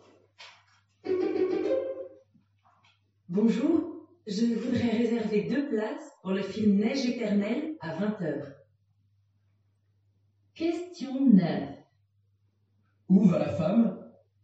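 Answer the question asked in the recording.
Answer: Au cinéma.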